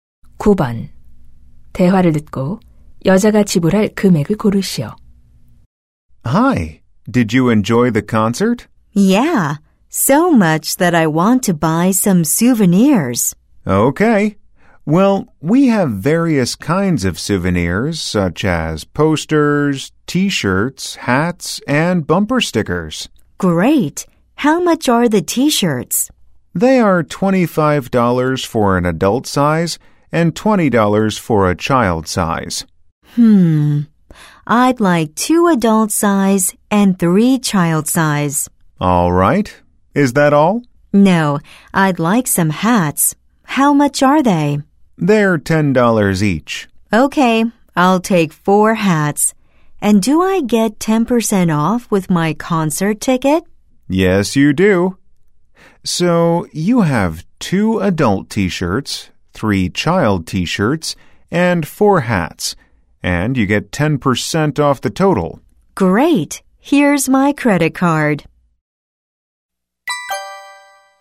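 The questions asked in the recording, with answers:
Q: 대화를 듣고 여자가 지불할 금액을 고르시오.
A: 135달러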